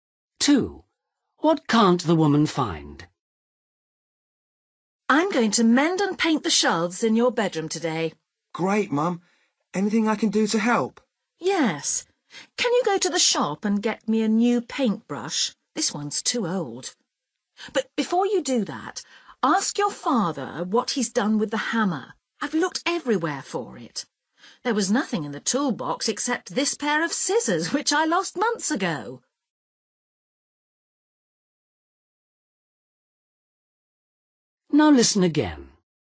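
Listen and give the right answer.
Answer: the hammer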